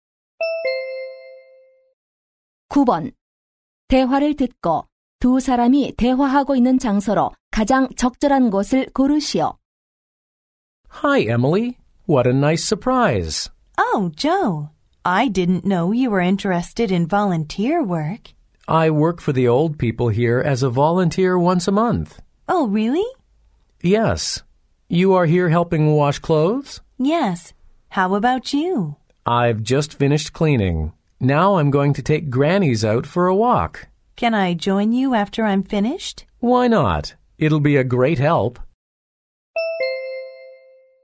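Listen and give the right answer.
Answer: 양로원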